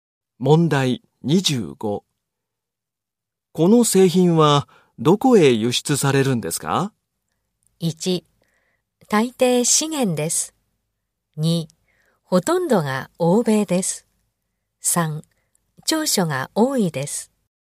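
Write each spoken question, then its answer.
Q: この製品は、どこへ輸出されるんですか?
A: 2: ほとんどが欧米です。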